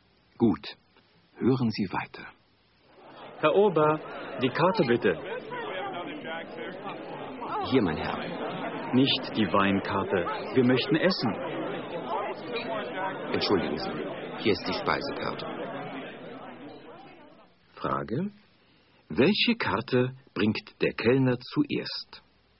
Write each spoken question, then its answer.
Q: Welche Karte bringt der Kellner zuerst?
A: Er bringt zuerst die Weinkarte.